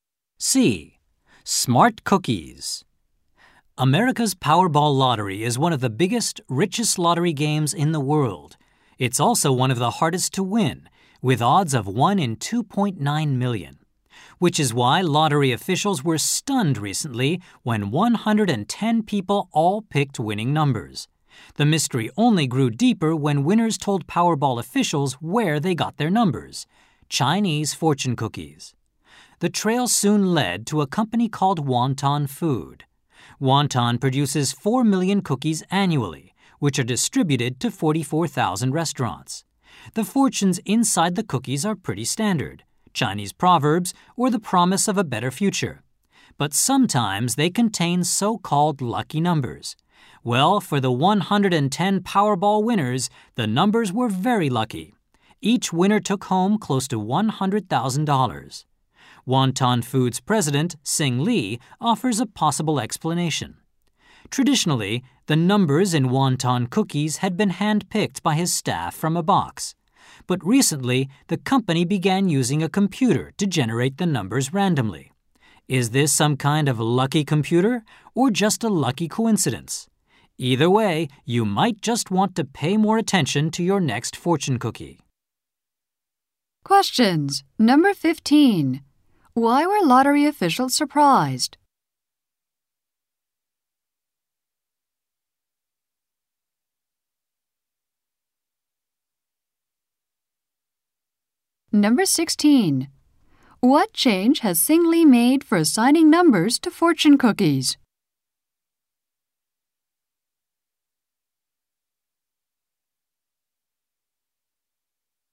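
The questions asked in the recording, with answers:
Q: Why were lottery officials surprised?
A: 110 people all picked the winning numbers

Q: What change has Sing Lee made for assigning numbers to fortune cookies?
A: Numbers are now generated randomly by computer instead of hand-picked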